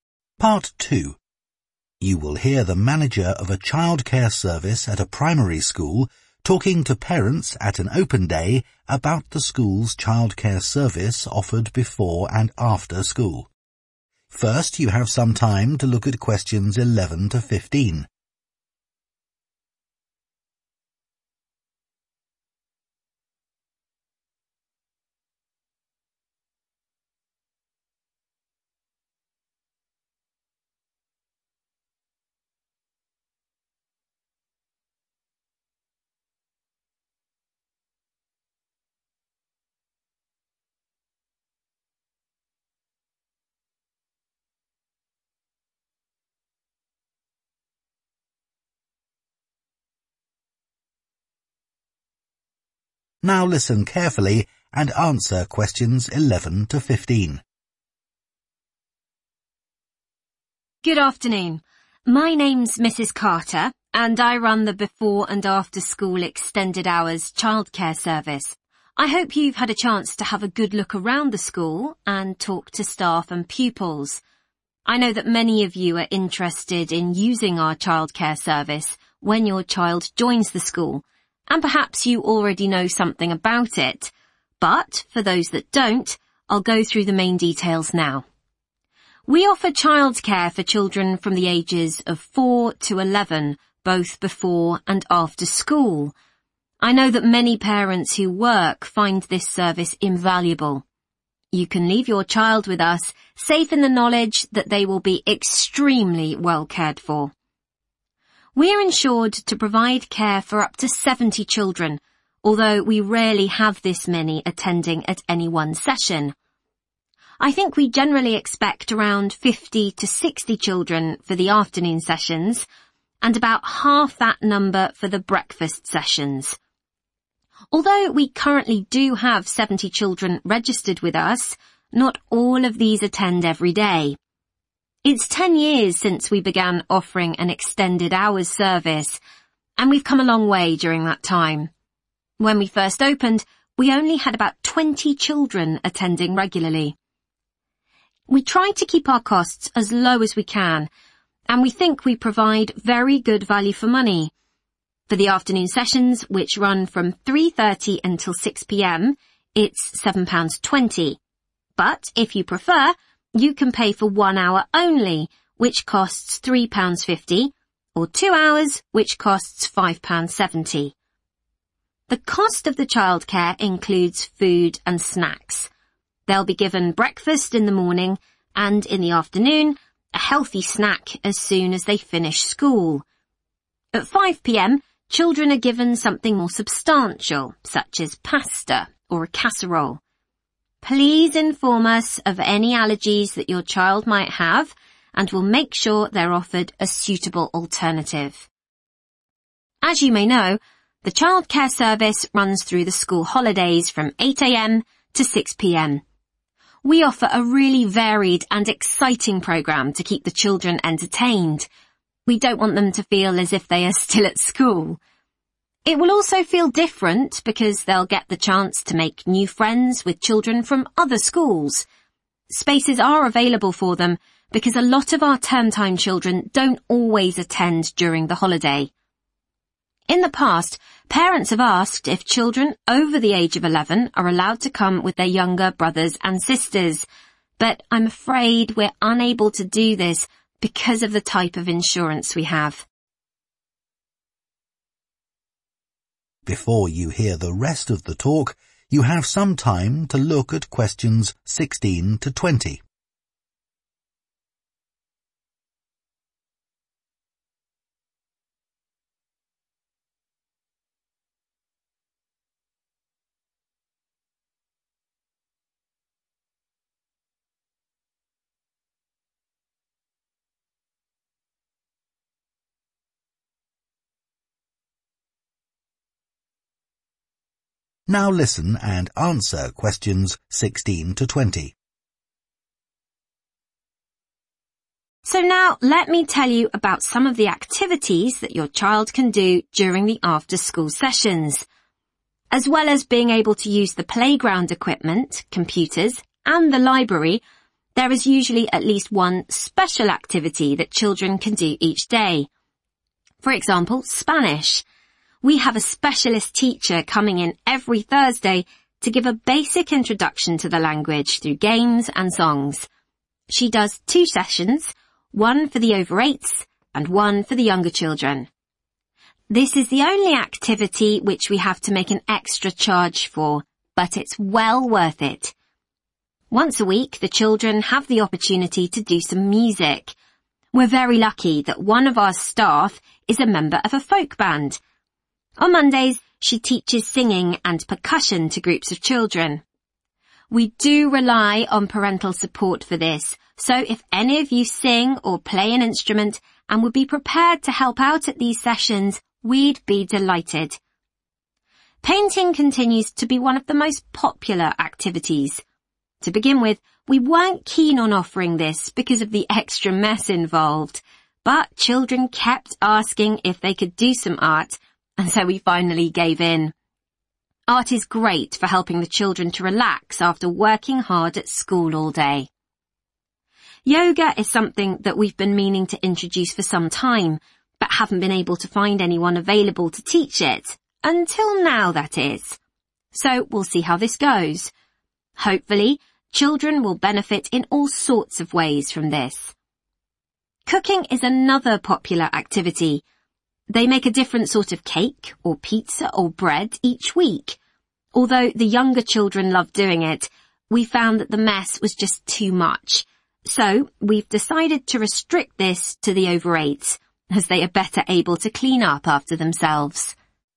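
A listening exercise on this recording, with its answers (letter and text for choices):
Choose TWO letters, A-E.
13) How much does childcare cost for a complete afternoon session per child?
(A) £3.50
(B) £5.70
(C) £7.20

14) What does the manager say about food?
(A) Children with allergies should bring their own food.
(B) Children may bring healthy snacks with them.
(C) Children are given a proper meal at 5 p.m.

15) What is different abo t arrangements in the school holidays?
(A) Children from other schools can attend.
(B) Older children can attend.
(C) A greater number of children can attend.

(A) has limited availability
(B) is no longer available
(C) is for over 8s only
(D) requires help from parents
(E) involves an additional fee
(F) is a new activity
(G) was requested by children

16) Spanish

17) Music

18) Painting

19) Yoga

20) Cooking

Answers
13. (C) £7.20
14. (C) Children are given a proper meal at 5 p.m.
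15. (A) Children from other schools can attend.
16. (E) involves an additional fee
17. (D) requires help from parents
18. (G) was requested by children
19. (F) is a new activity
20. (C) is for over 8s only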